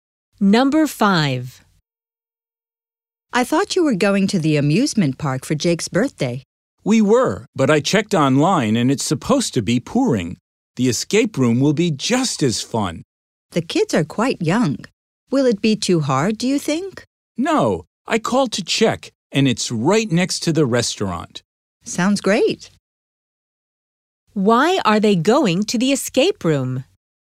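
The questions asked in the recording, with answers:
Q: Why are they going to the escape room?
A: Because it's supposed to pour with rain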